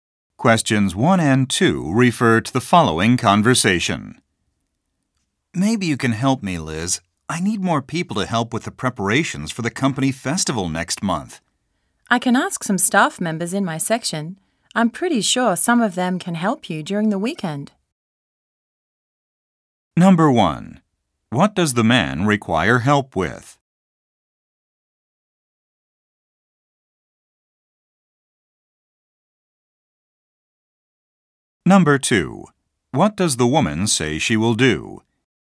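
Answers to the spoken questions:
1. Preparations for the company festival
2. Ask some staff members in her section to help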